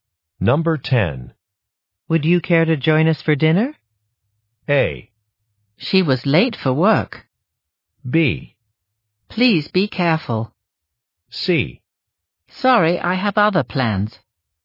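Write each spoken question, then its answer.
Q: Would you care to join us for dinner?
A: C: Sorry, I have other plans.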